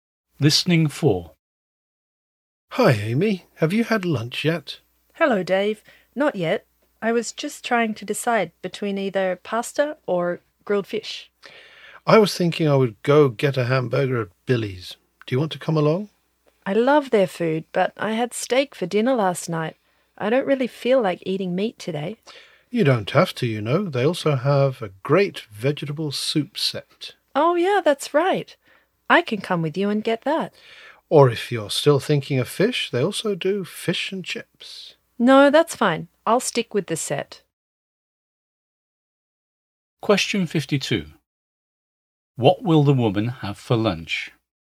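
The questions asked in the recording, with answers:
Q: What will the woman have for lunch?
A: The vegetable soup set at Billy's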